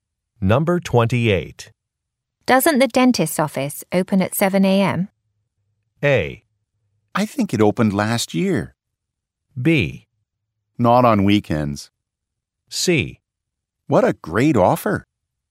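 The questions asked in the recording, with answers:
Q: Doesn't the dentist's office open at 7 a.m.?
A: B: Not on weekends.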